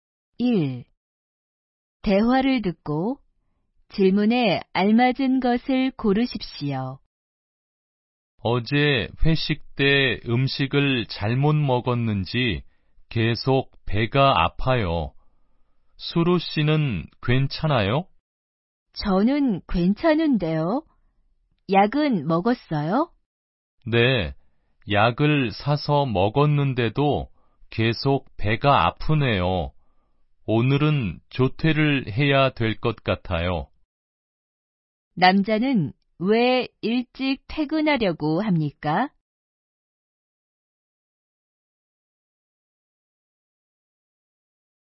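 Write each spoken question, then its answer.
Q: 남자는 왜 일찍 퇴근하려고 합니까?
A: 어제 회식 때 음식을 잘못 먹어서 약을 먹었는데도 계속 배가 아파서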